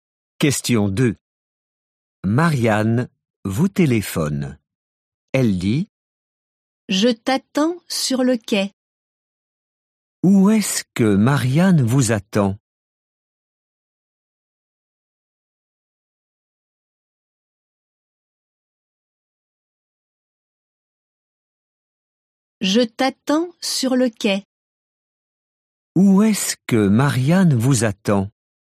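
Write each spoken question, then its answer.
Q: Où est-ce que Marianne vous attend ?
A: Sur le quai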